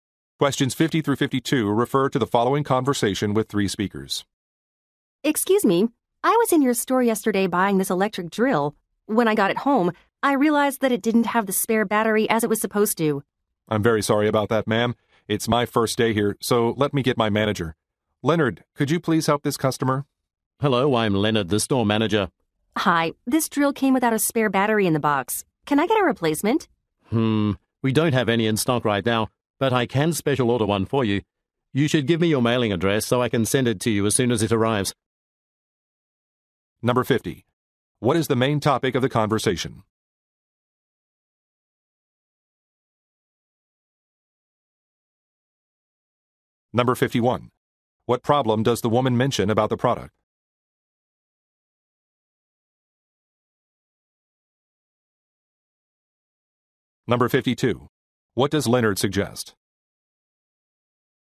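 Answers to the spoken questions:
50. A drill that came without its spare battery
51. It did not include the spare battery
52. Giving him her mailing address so he can send a special-ordered battery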